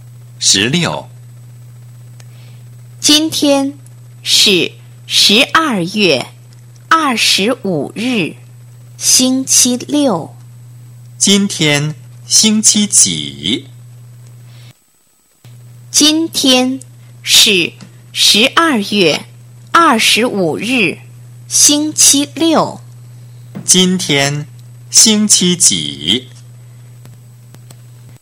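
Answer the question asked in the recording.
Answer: 星期六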